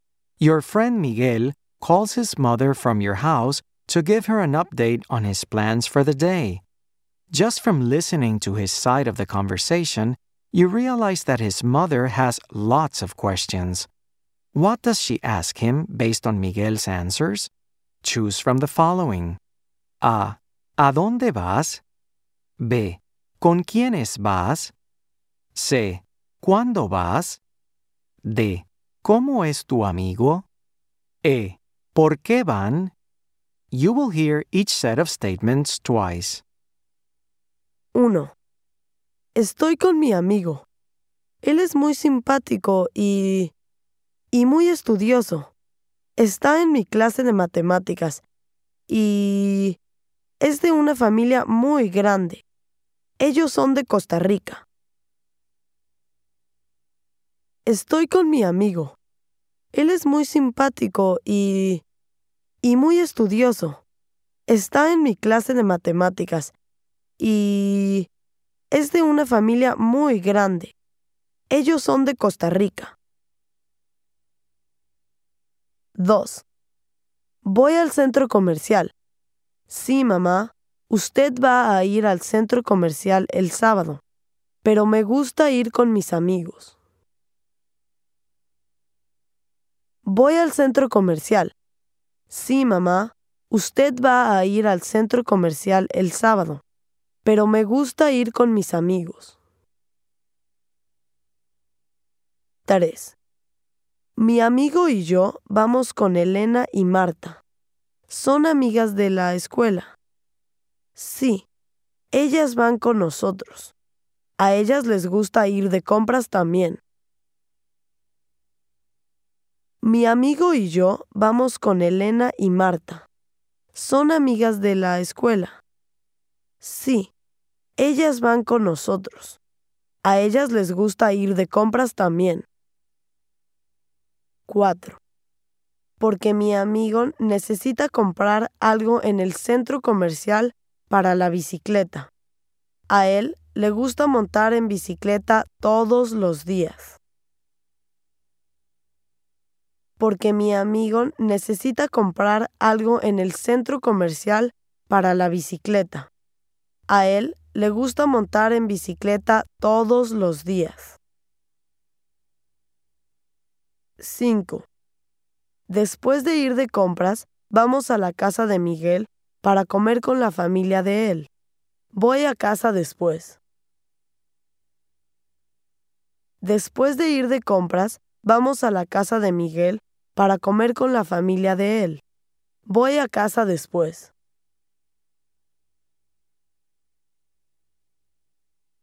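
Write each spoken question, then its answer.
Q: What does she ask him based on Miguel's answers?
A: D: ¿Cómo es tu amigo?

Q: What does she ask him based on Miguel's answers?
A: A: ¿A dónde vas?

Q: What does she ask him based on Miguel's answers?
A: B: ¿Con quiénes vas?

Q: What does she ask him based on Miguel's answers?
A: E: ¿Por qué van?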